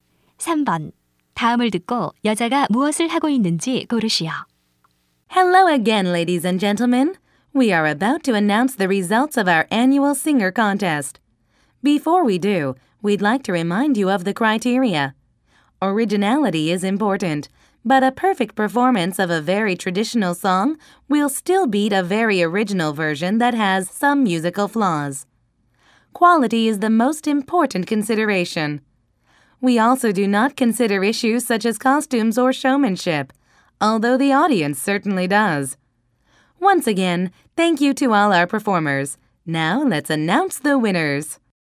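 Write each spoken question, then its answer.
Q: 다음을 듣고 여자가 무엇을 하고 있는지 고르시오.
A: 노래 대회 결과 발표 전에 심사 기준을 설명하고 있다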